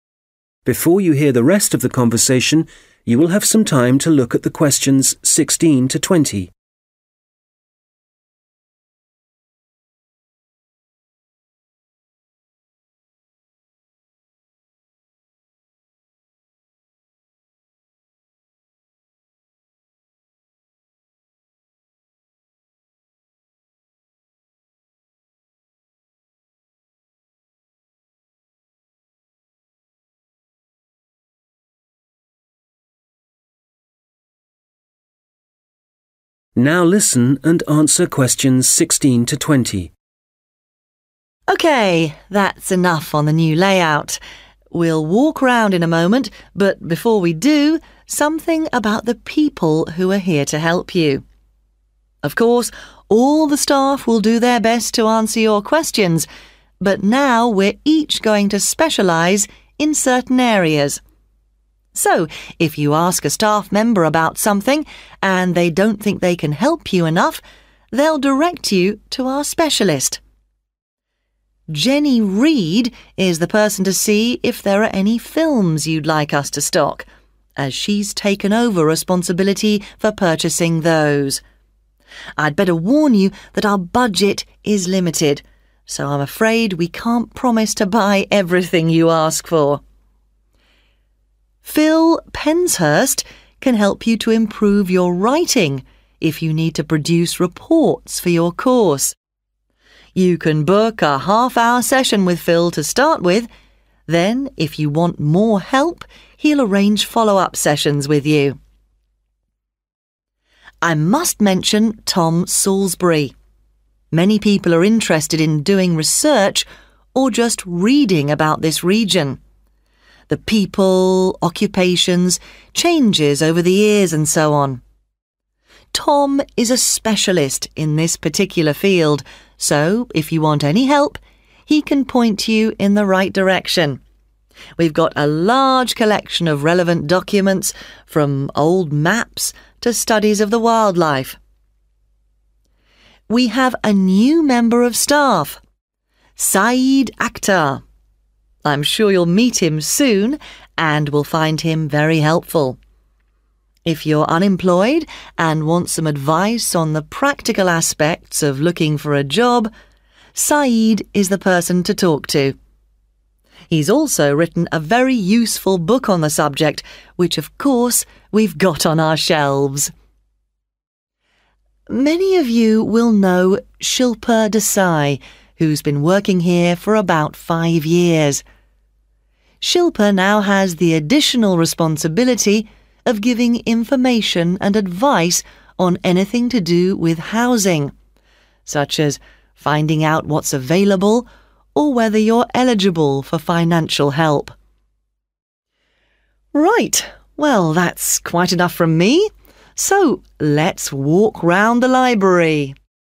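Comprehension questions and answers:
Questions 16-20: Complete the table below. Write ONE WORD ONLY for each answer.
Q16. Jenny Reed: Buying 16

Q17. Phil Penshurst: Help with writing 17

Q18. Tom Salisbury: Information on topics related to the 8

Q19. Saeed Aktar: Finding a 9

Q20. Shilpa Desai: Help with 10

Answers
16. films
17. reports
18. region
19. job
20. housing

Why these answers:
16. Jenny Reed is the person to see if there are any films you'd like us to stock, as she's taken over responsibility for purchasing those. [Jenny Reed là người xem liệu có bất kỳ bộ phim nào mà bạn muốn chúng tôi cung cấp hay không, vì cô ấy chịu trách nhiệm mua những bộ phim đó]
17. Phil Penshurst can help you to improve your writing if you need to produce reports for your course. [Phil Penshurst có thể giúp bạn cải thiện bài viết của mình nếu bạn cần tạo báo cáo cho khóa học]
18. I must mention Tom Salisbury. 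Many people are interested in doing research or just reading about this region – the people, occupations, changes over the years, and so on. Tom is a specialist in this particular field [Tôi phải nhắc đến Tom Salisbury. Nhiều người quan tâm đến việc nghiên cứu hoặc chỉ đọc về khu vực này – con người, nghề nghiệp, những thay đổi trong những năm qua, v.v. Tom là một chuyên gia trong lĩnh vực cụ thể này]
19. I'm sure you'll meet him soon and will find him very helpful. If you're unemployed and want some advice on the practical aspects of looking for a job, Saeed is the person to talk to. [Tôi chắc rằng bạn sẽ sớm gặp anh ấy và sẽ thấy anh ấy có thể giúp đỡ rất nhiều. Nếu bạn đang thất nghiệp và muốn có một số lời khuyên về các khía cạnh thực tế khi tìm kiếm một công việc, Saeed là người bạn nên nói chuyện cùng]

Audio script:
OK, that's enough on the new layout. We'll walk round in a moment, but before we do, something about the people who are here to help you. 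Of course, all the staff will do their best to answer your questions, but now we're each going to specialise in certain areas. So if you ask a staff member about something, and they don't think they can help you enough, they'll direct you to our specialist.
(Q16) Jenny Reed is the person to see if there are any films you'd like us to stock, as she's taken over responsibility for purchasing those.
(Q17) Phil Penshurst can help you to improve your writing if you need to produce reports for your course. [Phil Penshurst có thể giúp bạn cải thiện bài viết của mình nếu bạn cần tạo báo cáo cho khóa học] You can book a half-hour session with Phil to start with, then if you want more help, he'll arrange follow-up sessions with you.
(Q18) I must mention Tom Salisbury. Many people are interested in doing research or just reading about this region – the people, occupations, changes over the years, and so on. 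Tom is a specialist in this particular field [Tôi phải nhắc đến Tom Salisbury. Tom là một chuyên gia trong lĩnh vực cụ thể này], so if you want any help, he can point you in the right direction – we've got a large collection of relevant documents from old maps to studies of the wildlife.
We have a new member of staff. (Q19) I'm sure you'll meet him soon and will find him very helpful. If you're unemployed and want some advice on the practical aspects of looking for a job, Saeed is the person to talk to.
Many of you will know Shilpa Desai, who's been working here for about five years. (Q20) Shilpa now has the additional responsibility of giving information and advice on anything to do with housing [Shilpa hiện có thêm trách nhiệm cung cấp thông tin và lời khuyên về bất cứ điều gì liên quan đến nhà ở], such as finding out what's available, or whether you're eligible for financial help.
Right, well that's quite enough from me, so let's walk round the library.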